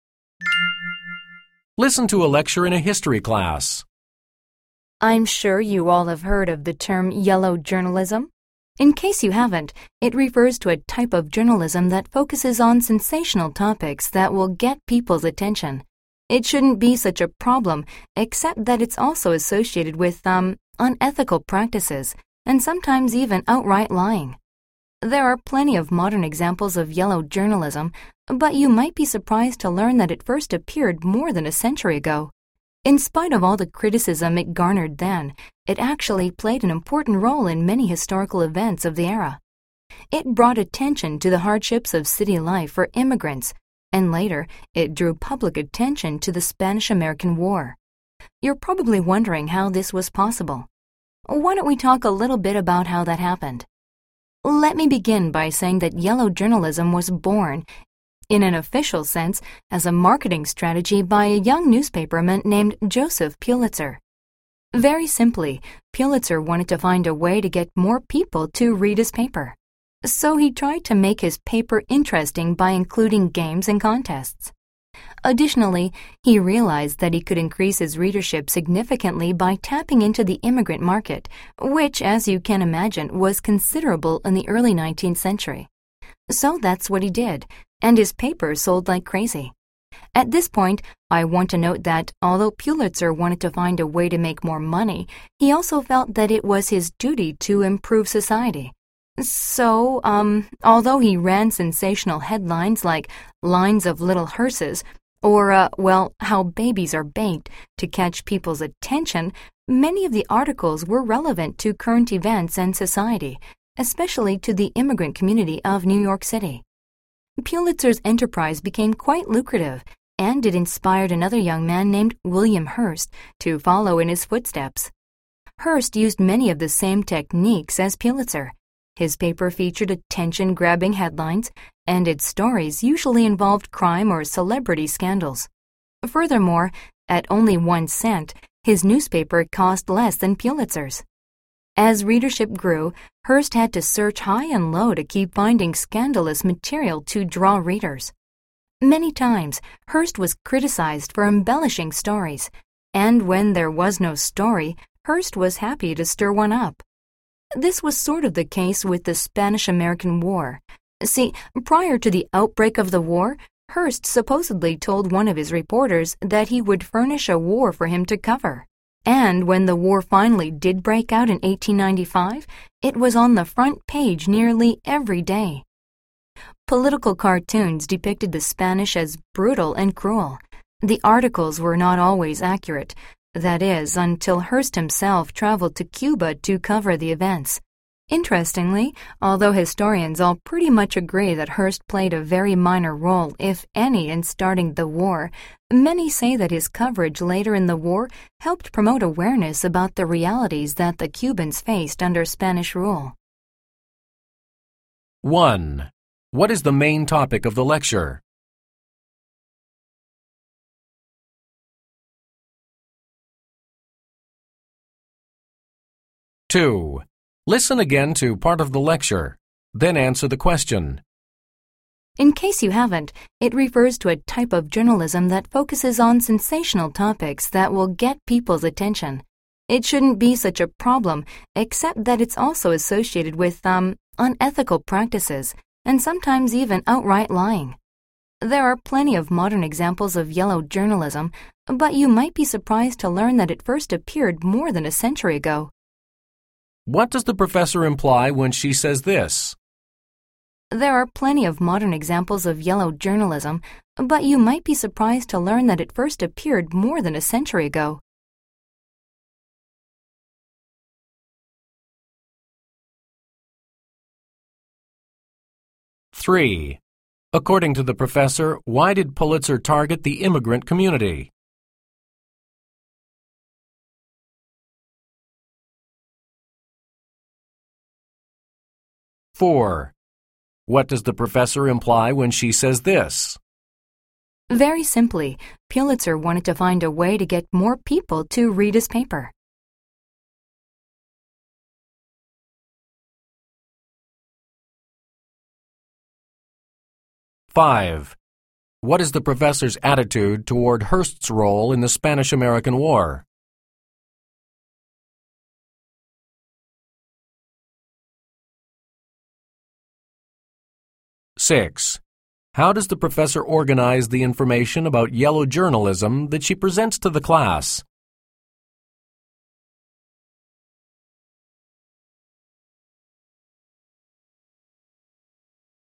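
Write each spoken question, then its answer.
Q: What is the main topic of the lecture?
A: The origins of yellow journalism and its role in historical events

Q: According to the professor, why did Pulitzer target the immigrant community?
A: To increase his readership, since the immigrant market was large

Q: What is the professor's attitude toward Hearst's role in the Spanish-American War?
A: She thinks he played little or no role in starting it, but his later coverage raised awareness of Cubans' realities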